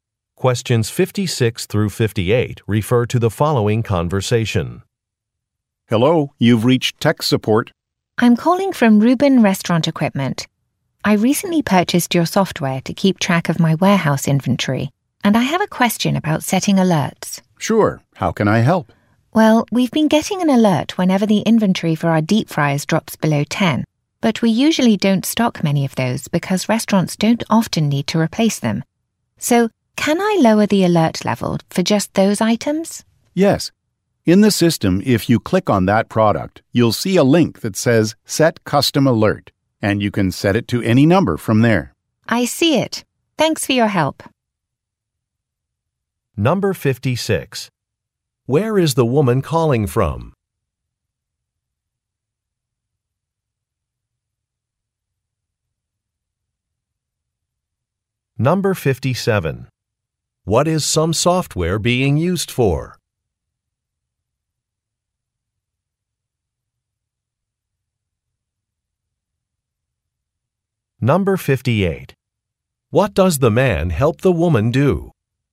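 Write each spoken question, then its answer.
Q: Where is the woman calling from?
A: A restaurant equipment company

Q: What is some software being used for?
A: Tracking warehouse inventory

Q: What does the man help the woman do?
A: Set a custom inventory alert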